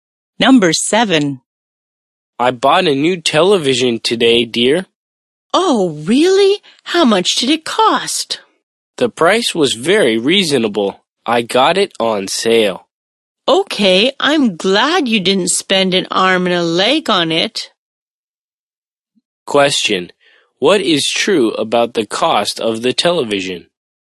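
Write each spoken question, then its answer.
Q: Question. What is true about the cost of the television?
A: It was reasonable; it was on sale.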